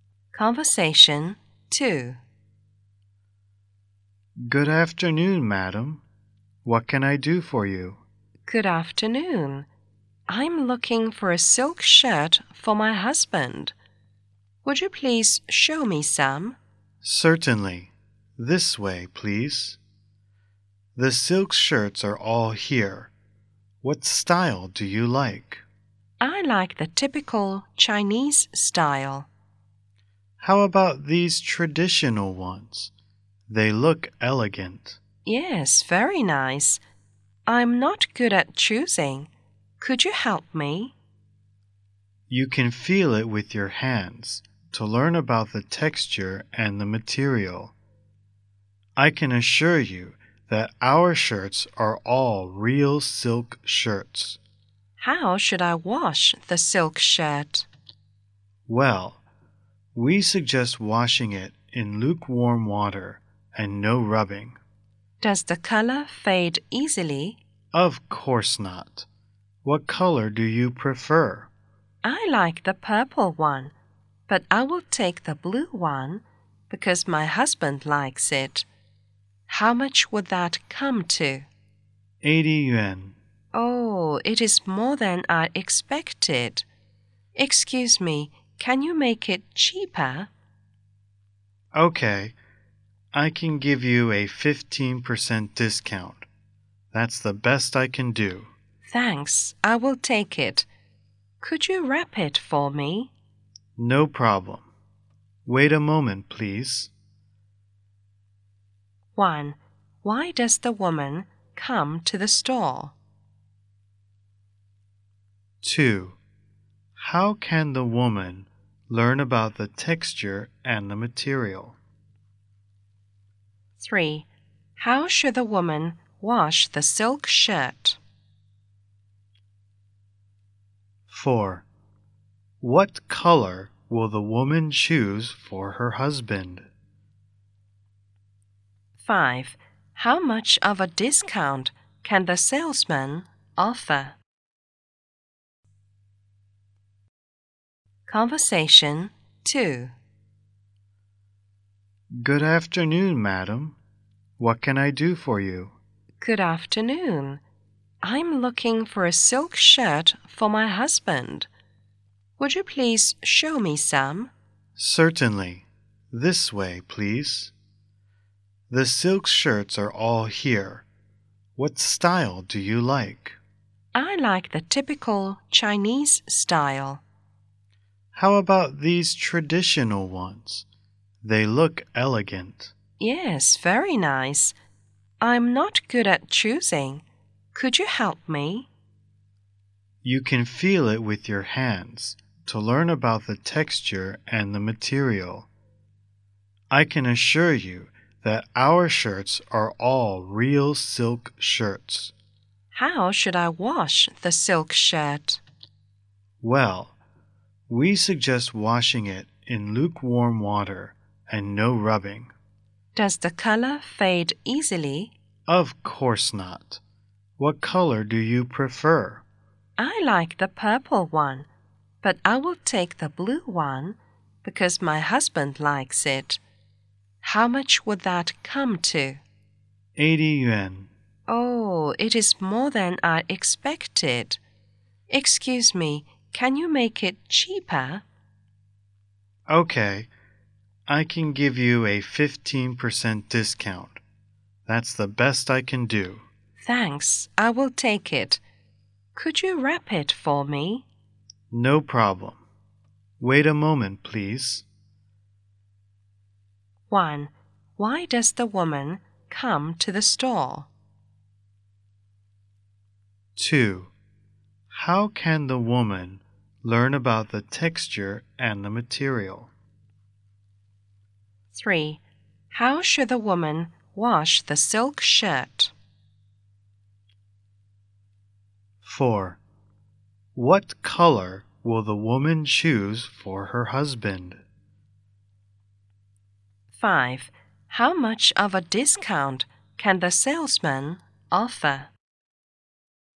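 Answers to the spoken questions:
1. To buy a silk shirt for her husband
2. By feeling it with her hands
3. In lukewarm water with no rubbing
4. Blue
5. 15%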